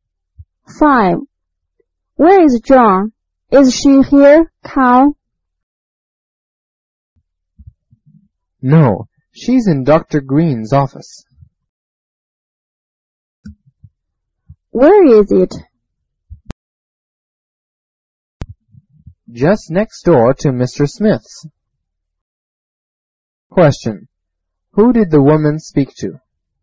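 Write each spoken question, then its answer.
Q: Who did the woman speak to?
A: Carl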